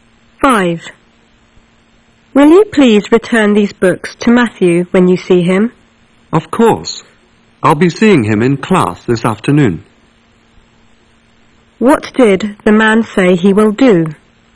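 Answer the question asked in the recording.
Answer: Return the books to Matthew in class this afternoon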